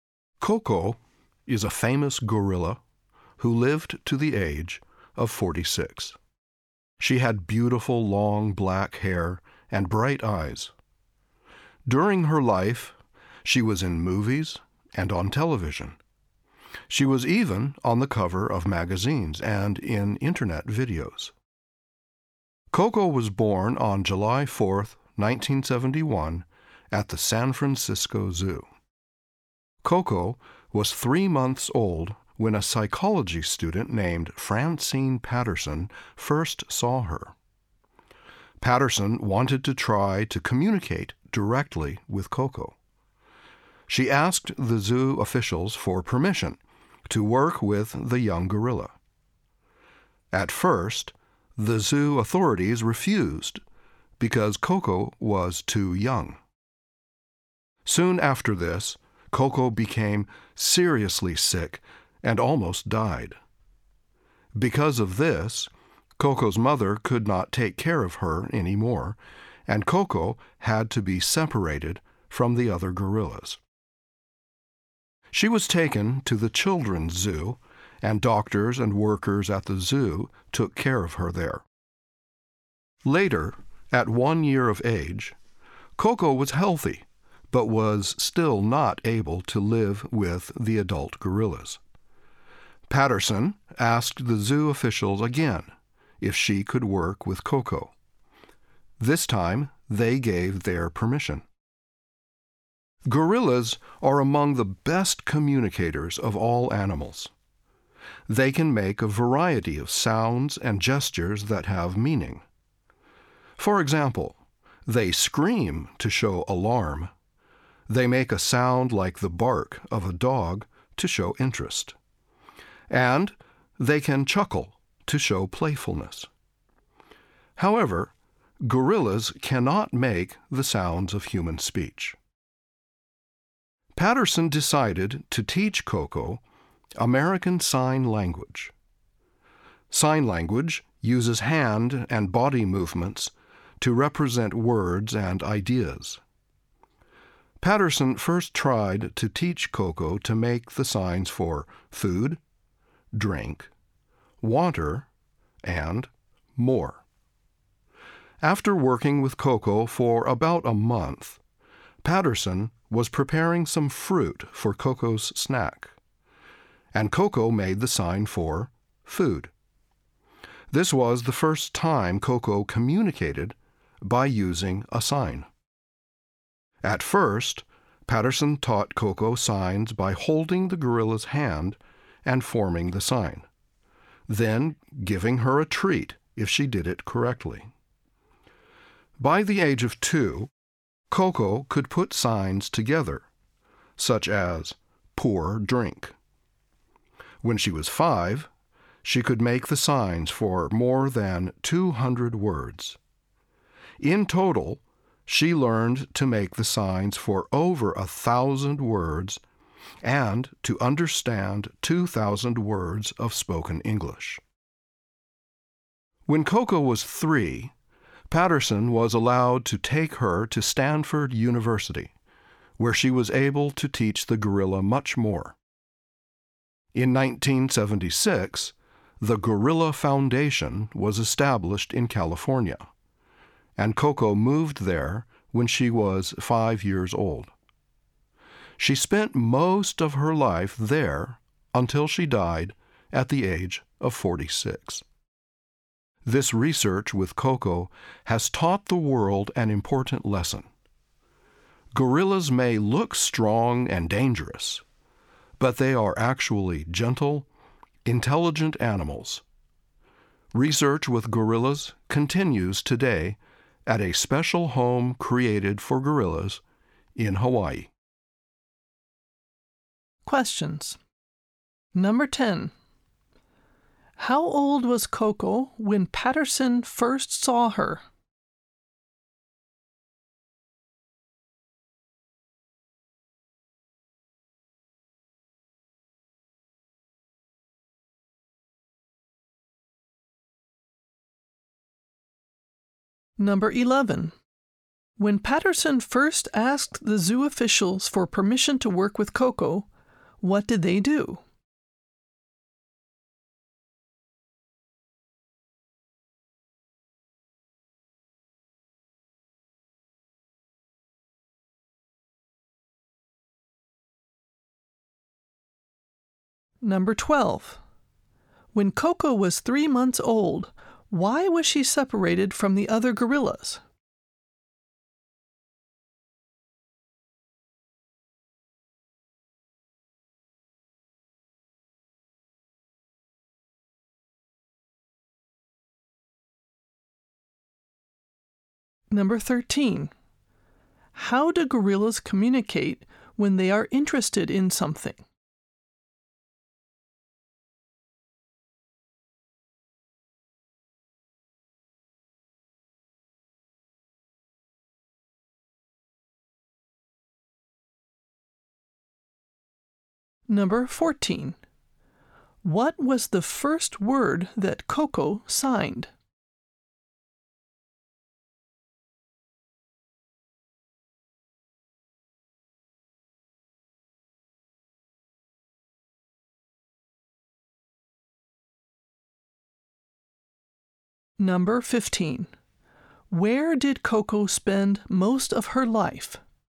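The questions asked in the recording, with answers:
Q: How old was Coco when Patterson first saw her?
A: 3 months old

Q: When Patterson first asked the zoo officials for permission to work with Coco, what did they do?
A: They refused because Coco was too young

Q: When Coco was 3 months old, why was she separated from the other gorillas?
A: She became seriously sick, so her mother could not take care of her

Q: How do gorillas communicate when they are interested in something?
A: They make a sound like a dog's bark

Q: What was the first word that Coco signed?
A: Food

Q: Where did Coco spend most of her life?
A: At the Gorilla Foundation in California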